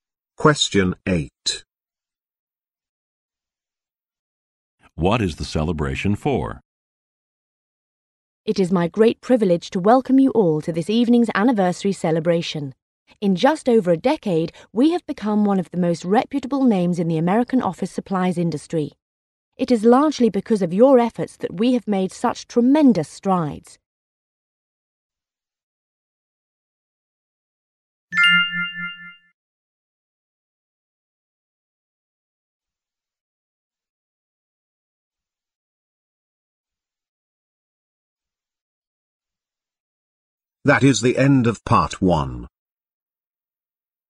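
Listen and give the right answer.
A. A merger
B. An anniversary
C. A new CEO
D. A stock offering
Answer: B. An anniversary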